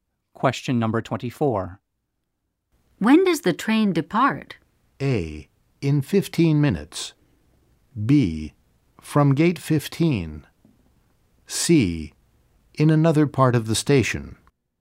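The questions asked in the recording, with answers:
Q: When does the train depart?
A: A: In 15 minutes.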